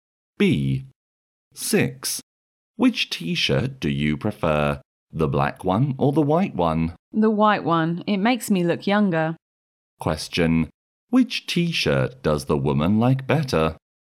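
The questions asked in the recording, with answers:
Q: Which t-shirt does the woman like better?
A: The white one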